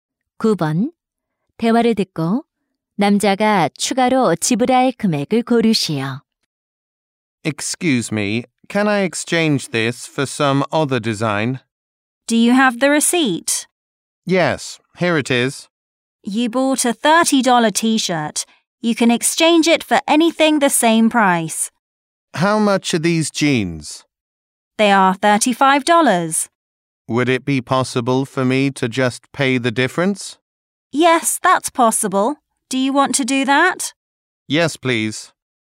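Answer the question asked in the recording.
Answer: 5달러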